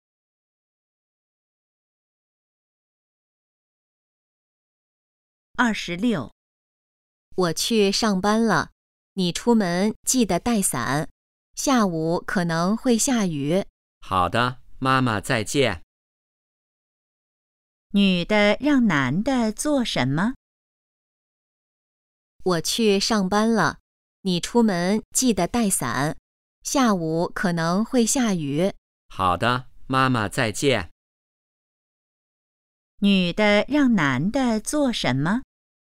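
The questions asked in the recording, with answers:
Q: 女的让男的做什么?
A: 出门带伞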